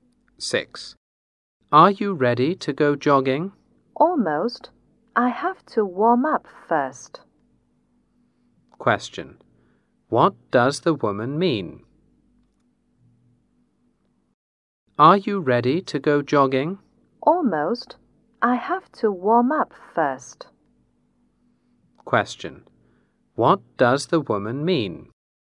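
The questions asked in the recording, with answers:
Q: What does the woman mean?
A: She is almost ready but has to warm up first.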